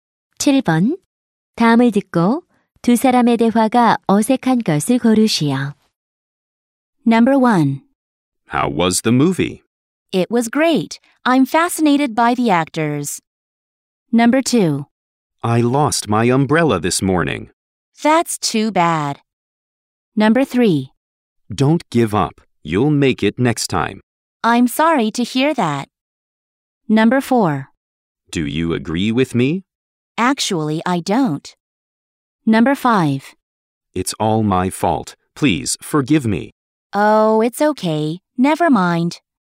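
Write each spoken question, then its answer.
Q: 다음을 듣고 두 사람의 대화가 어색한 것을 고르시오.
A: 3: Don't give up. You'll make it next time. / I'm sorry to hear that.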